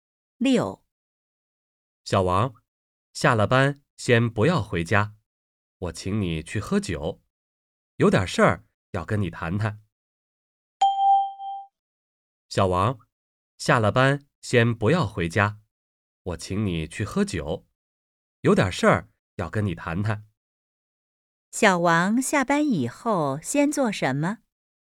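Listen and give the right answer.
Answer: 去喝酒,谈点事儿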